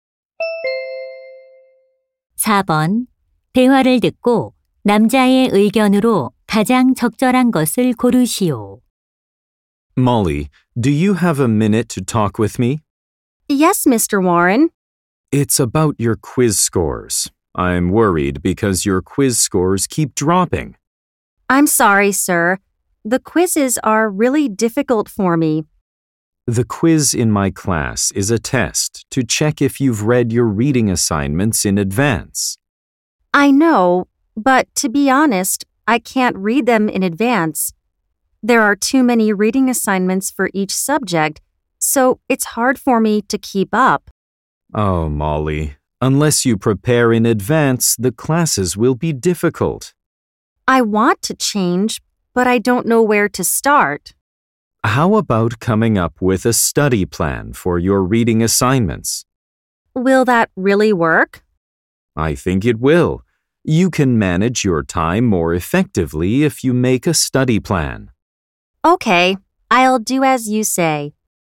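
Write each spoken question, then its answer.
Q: 대화를 듣고 남자의 의견으로 가장 적절한 것을 고르시오.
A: 읽기 과제를 위한 학습 계획을 세우면 시간을 효율적으로 관리할 수 있다.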